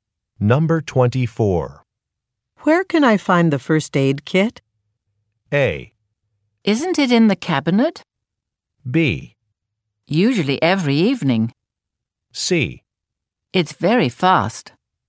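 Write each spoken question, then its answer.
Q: Where can I find the first aid kit?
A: A: Isn't it in the cabinet?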